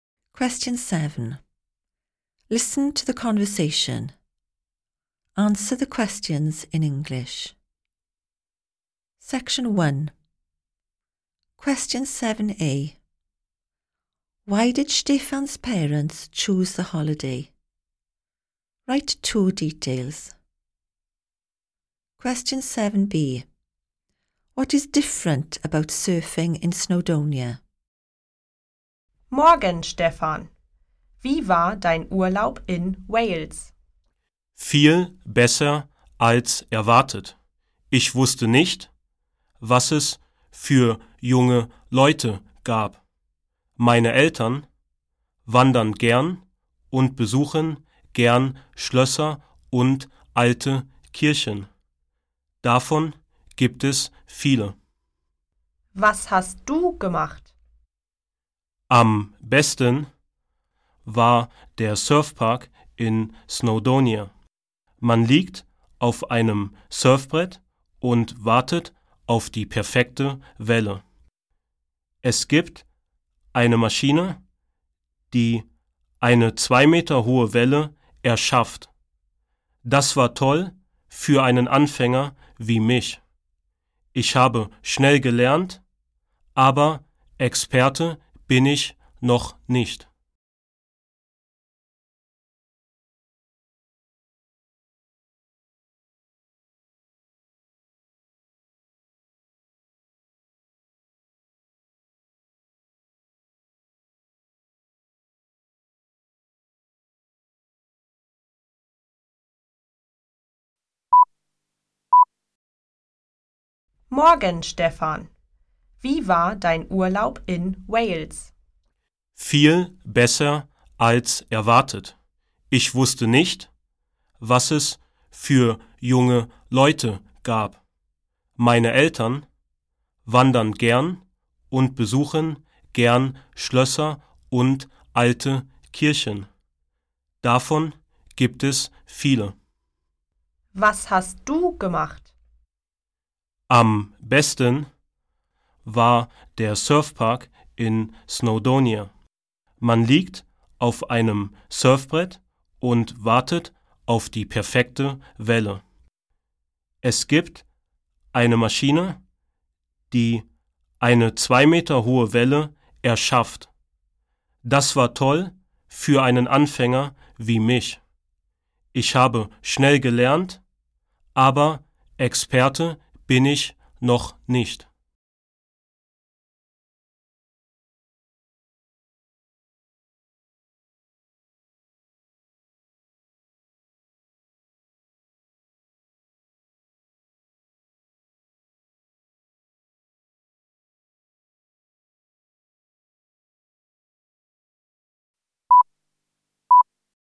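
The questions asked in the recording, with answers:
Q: Why did Stefan's parents choose the holiday?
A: They like hiking and visiting castles and old churches

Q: What is different about surfing in Snowdonia?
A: A machine creates a 2-metre-high wave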